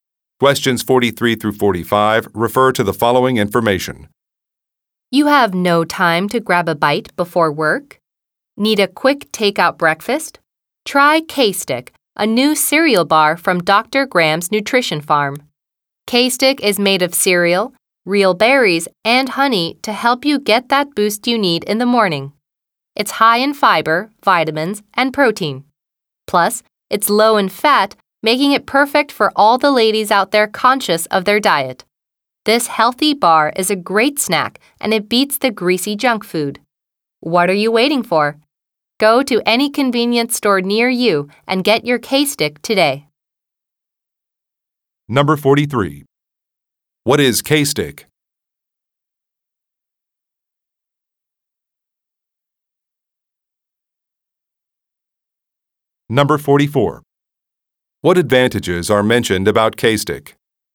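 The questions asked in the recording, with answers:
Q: What is K-Stick?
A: A cereal bar

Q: What advantages are mentioned about K-Stick?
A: High in fiber, vitamins and protein, low in fat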